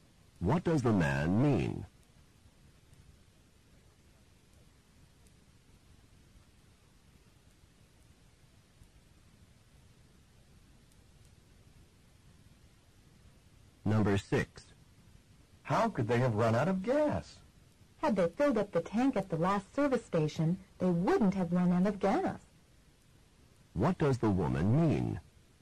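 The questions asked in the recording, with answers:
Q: What does the woman mean?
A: They did not fill the tank at the last station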